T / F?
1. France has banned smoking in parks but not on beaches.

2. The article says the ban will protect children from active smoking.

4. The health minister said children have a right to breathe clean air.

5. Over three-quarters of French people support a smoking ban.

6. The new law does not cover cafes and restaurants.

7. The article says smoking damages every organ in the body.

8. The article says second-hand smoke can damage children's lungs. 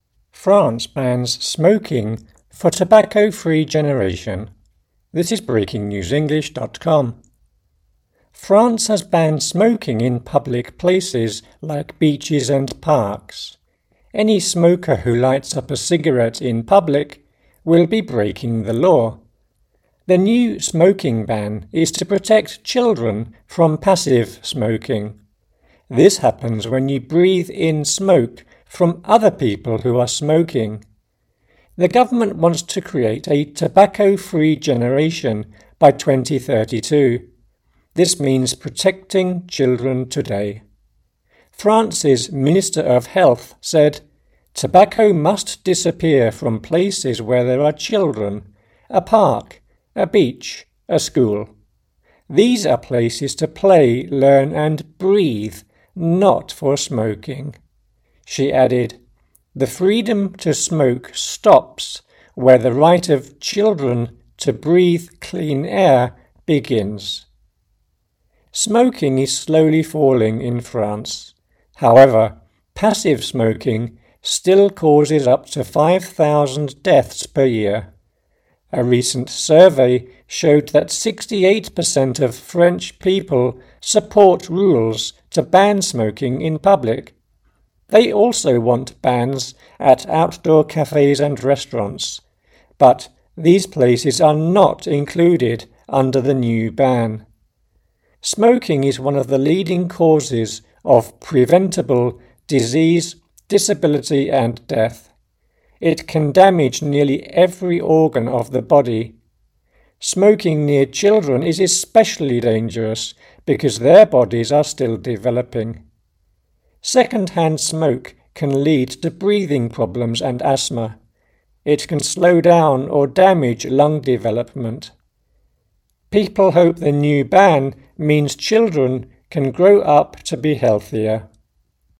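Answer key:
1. F
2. F
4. T
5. F
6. T
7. F
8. T

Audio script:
France bans smoking for tobacco-free generation
France has banned smoking in public places like beaches and parks. Any smoker who lights up a cigarette in public will be breaking the law. The new smoking ban is to protect children from passive smoking. This happens when you breathe in smoke from other people who are smoking. The government wants to create a tobacco-free generation by 2032. This means protecting children today. France's Minister of Health said: "Tobacco must disappear from places where there are children ... a park, a beach, a school. These are places to play, learn, and breathe; not for smoking." She added: "The freedom to smoke stops where the right of children to breathe clean air begins."
Smoking is slowly falling in France. However, passive smoking still causes up to 5,000 deaths per year. A recent survey showed that 68 per cent of French people support rules to ban smoking in public. 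They also want bans at outdoor cafes and restaurants, but these places are not included under the new ban. Smoking is one of the leading causes of preventable disease, disability and death. It can damage nearly every organ of the body. Smoking near children is especially dangerous because their bodies are still developing. Second-hand smoke can lead to breathing problems and asthma. It can slow down or damage lung development. People hope the new ban means children can grow up to be healthier.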